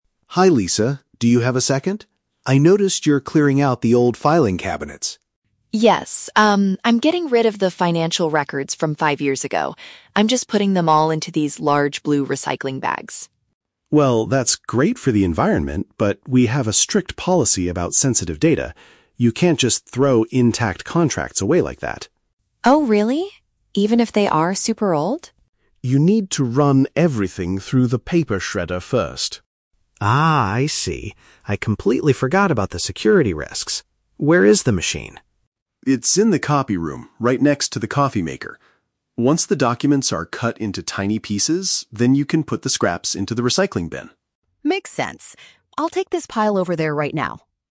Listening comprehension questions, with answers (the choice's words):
Listen to the conversation between a manager and an accountant, then choose the correct answer (A, B, or C) for each question.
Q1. What is Lisa currently doing?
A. Disposing of some outdated business documents.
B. Buying large blue bags for the office.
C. Reorganizing the financial records for the new year.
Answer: Disposing of some outdated business documents.

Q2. Why does Mark stop Lisa from throwing the papers directly into the bag?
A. Because she needs to scan the contracts into the computer first.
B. Because the recycling bags are already completely full.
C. Because the pages contain private information that must be protected.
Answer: Because the pages contain private information that must be protected.

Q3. What does Lisa have to do with the documents next?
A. Destroy them using a specific office device.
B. Leave them next to the coffee maker in the breakroom.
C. Hand them over to the clients directly.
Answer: Destroy them using a specific office device.

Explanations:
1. Lisa says she is "getting rid of the financial records from five years ago." Option (A) uses paraphrasing ("disposing of" = "getting rid of", "outdated business documents" = "financial records from five years ago"). Option (B) is a trap; she is using the blue bags, not buying them. Option (C) is a trap; she is throwing them away, not reorganizing them for a new year.
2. Mark mentions that they have a strict policy about "sensitive data" and that "Client details and bank account numbers" are on the pages, which poses "security risks". Option (C) paraphrases this as "private information that must be protected." Options (A) and (B) are plausible office situations but are never mentioned in the audio.
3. Mark tells her to "run everything through the paper shredder" so the documents are "cut into tiny pieces." Option (A) is a paraphrase for using a shredder to destroy paper. Option (B) is a trap; the shredder is "next to the coffee maker," but she cannot just leave the intact papers there. Option (C) is a trap; the word "client" is mentioned, but she is not giving the papers to them.

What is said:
Mark: Hi Lisa, do you have a second? I noticed you're clearing out the old filing cabinets.
Lisa: Yes, um, I'm getting rid of the financial records from five years ago. I'm just putting them all into these large blue recycling bags.
Mark: Well, that's great for the environment, but we have a strict policy about sensitive data. You can't just throw intact contracts away like that.
Lisa: Oh, really? Even if they are super old?
Mark: Yes. You need to run everything through the paper shredder first.
Lisa: Ah, I see. I completely forgot about the security risks. Where is the machine?
Mark: It's in the copy room, right next to the coffee maker. Once the documents are cut into tiny pieces, then you can put the scraps into the recycling bin.